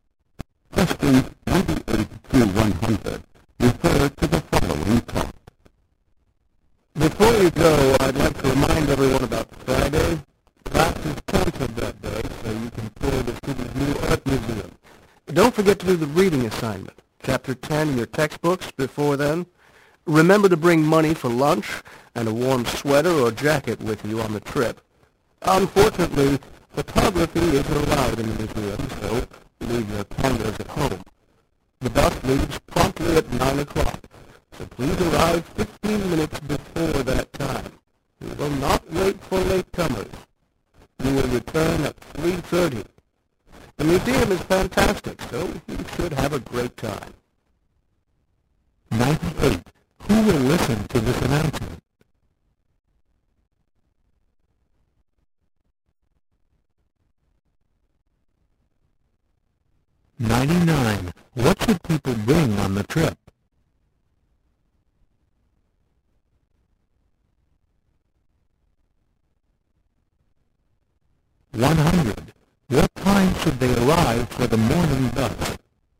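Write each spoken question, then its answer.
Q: Who will listen to this announcement?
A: Students

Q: What should people bring on the trip?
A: Lunch money and a warm sweater or jacket

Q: What time should they arrive for the morning bus?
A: 8:45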